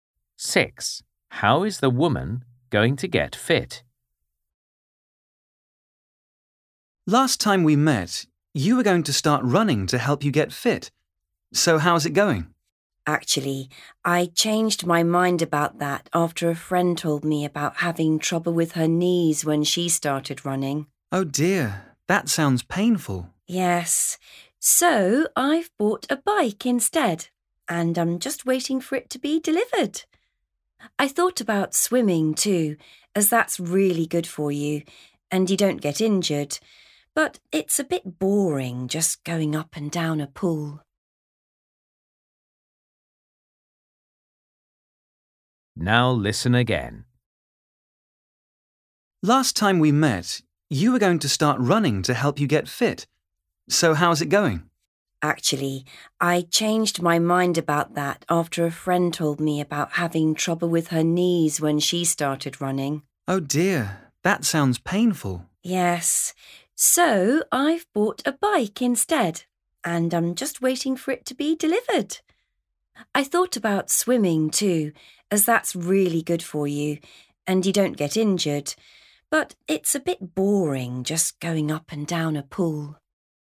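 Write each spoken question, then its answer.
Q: How is the woman going to get fit?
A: cycling (riding a bike)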